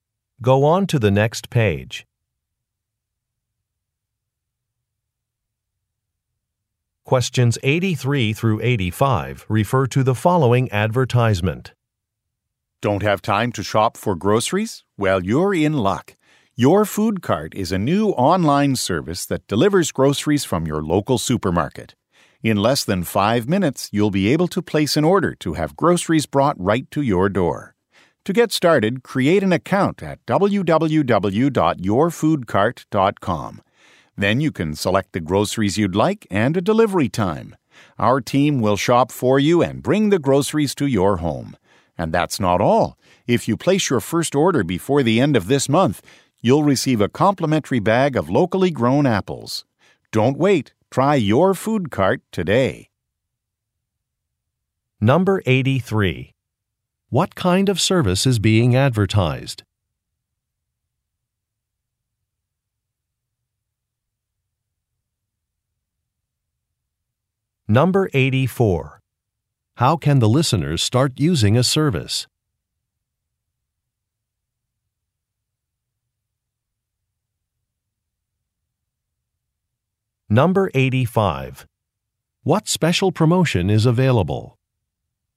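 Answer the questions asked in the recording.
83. Online grocery delivery
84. By creating an account on the website
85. A free bag of locally grown apples with a first order placed before the end of the month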